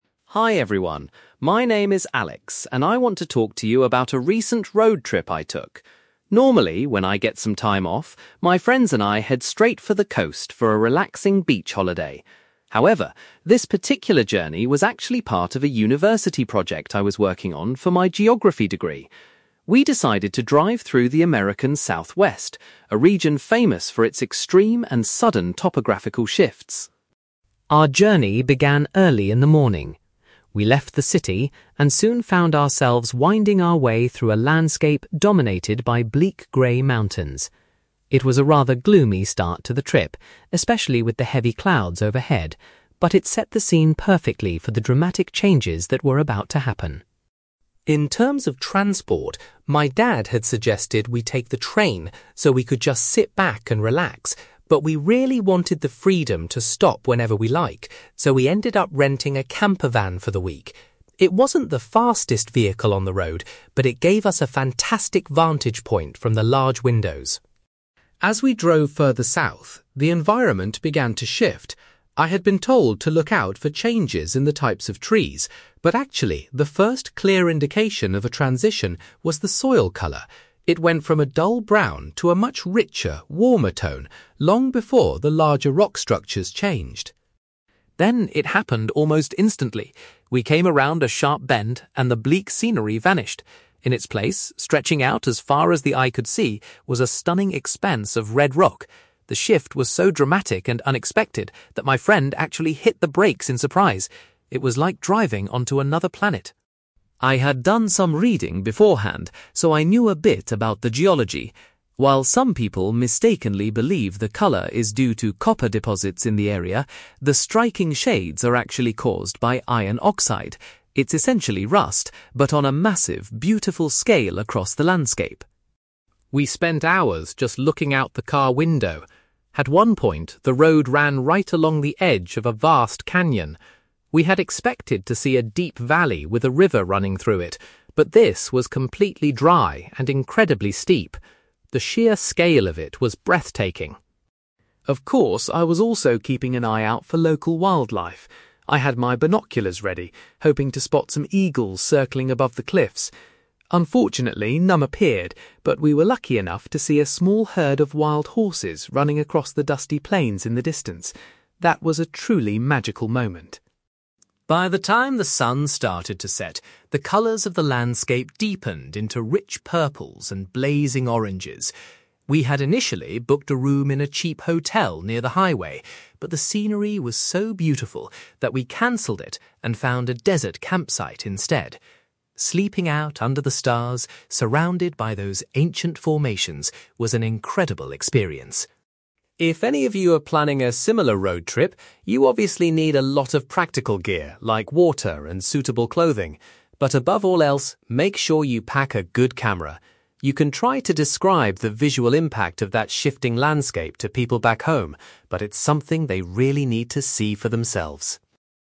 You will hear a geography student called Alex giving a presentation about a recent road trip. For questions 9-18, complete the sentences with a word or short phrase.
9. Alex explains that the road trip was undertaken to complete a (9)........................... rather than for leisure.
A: university project

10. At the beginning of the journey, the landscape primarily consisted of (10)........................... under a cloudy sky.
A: grey mountains

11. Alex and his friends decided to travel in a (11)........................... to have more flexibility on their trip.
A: camper van

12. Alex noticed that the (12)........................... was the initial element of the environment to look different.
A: soil colour

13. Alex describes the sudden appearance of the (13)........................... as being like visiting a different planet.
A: red rock

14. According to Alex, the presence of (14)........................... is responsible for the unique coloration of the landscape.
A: iron oxide

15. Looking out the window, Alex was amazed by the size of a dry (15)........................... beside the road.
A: canyon

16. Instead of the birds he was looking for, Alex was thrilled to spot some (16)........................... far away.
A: wild horses

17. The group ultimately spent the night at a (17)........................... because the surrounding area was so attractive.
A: desert campsite

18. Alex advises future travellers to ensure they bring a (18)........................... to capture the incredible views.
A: good camera

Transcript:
Alex: Hi everyone, my name is Alex, and I want to talk to you about a recent road trip I took. Normally, when I get some time off, my friends and I head straight for the coast for a relaxing beach holiday. However, this particular journey was actually part of a university project I was working on for my geography degree. We decided to drive through the American Southwest, a region famous for its extreme and sudden topographical shifts.
Our journey began early in the morning. We left the city and soon found ourselves winding our way through a landscape dominated by bleak grey mountains. It was a rather gloomy start to the trip, especially with the heavy clouds overhead, but it set the scene perfectly for the dramatic changes that were about to happen.
In terms of transport, my dad had suggested we take the train so we could just sit back and relax. But we really wanted the freedom to stop whenever we liked, so we ended up renting a camper van for the week. It wasn't the fastest vehicle on the road, but it gave us a fantastic vantage point from the large windows.
As we drove further south, the environment began to shift. I had been told to look out for changes in the types of trees, but actually, the first clear indication of a transition was the soil colour. It went from a dull brown to a much richer, warmer tone, long before the larger rock structures changed.
Then, it happened almost instantly. We came around a sharp bend, and the bleak scenery vanished. In its place, stretching out as far as the eye could see, was a stunning expanse of red rock. The shift was so dramatic and unexpected that my friend actually hit the brakes in surprise. It was like driving onto another planet.
I had done some reading beforehand, so I knew a bit about the geology. While some people mistakenly believe the colour is due to copper deposits in the area, the striking shades are actually caused by iron oxide. It's essentially rust, but on a massive, beautiful scale across the landscape.
We spent hours just looking out the car window. At one point, the road ran right along the edge of a vast canyon. We had expected to see a deep valley with a river running through it, but this was completely dry and incredibly steep. The sheer scale of it was breathtaking.
Of course, I was also keeping an eye out for local wildlife. I had my binoculars ready, hoping to spot some eagles circling above the cliffs. Unfortunately, none appeared, but we were lucky enough to see a small herd of wild horses running across the dusty plains in the distance. That was a truly magical moment.
By the time the sun started to set, the colours of the landscape deepened into rich purples and blazing oranges. We had initially booked a room in a cheap hotel near the highway, but the scenery was so beautiful that we cancelled it and found a desert campsite instead. Sleeping out under the stars surrounded by those ancient formations was an incredible experience.
If any of you are planning a similar road trip, you obviously need a lot of practical gear like water and suitable clothing. But above all else, make sure you pack a good camera. You can try to describe the visual impact of that shifting landscape to people back home, but it's something they really need to see for themselves.

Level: B2